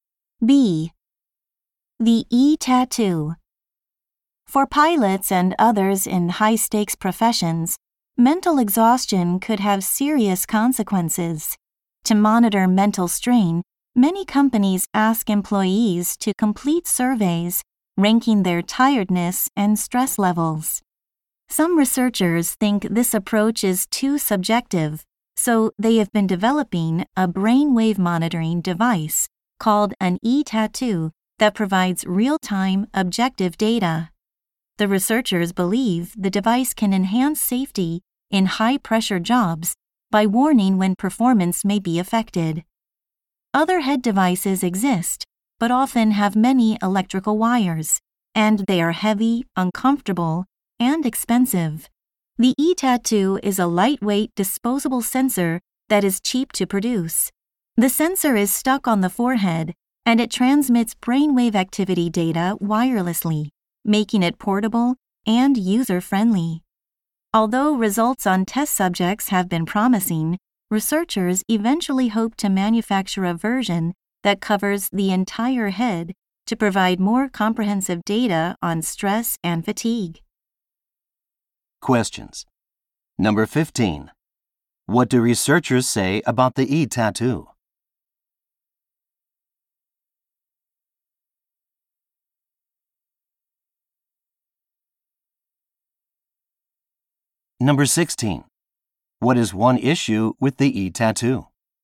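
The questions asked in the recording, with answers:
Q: What do researchers say about the e-tattoo?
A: It could improve safety in high-pressure jobs by giving objective real-time data on mental strain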